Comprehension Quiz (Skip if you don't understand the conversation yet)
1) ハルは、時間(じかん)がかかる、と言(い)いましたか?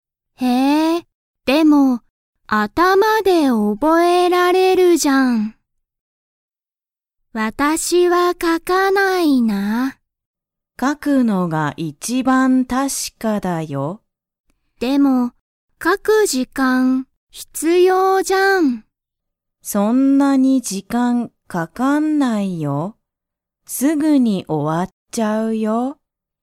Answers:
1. いいえ